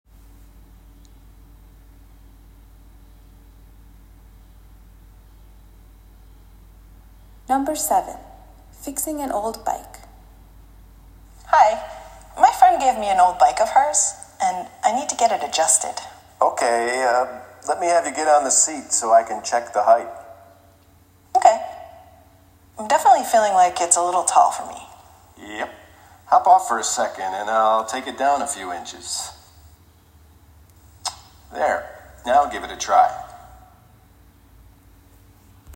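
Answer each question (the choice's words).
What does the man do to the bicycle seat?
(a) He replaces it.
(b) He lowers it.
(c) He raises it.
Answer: He lowers it.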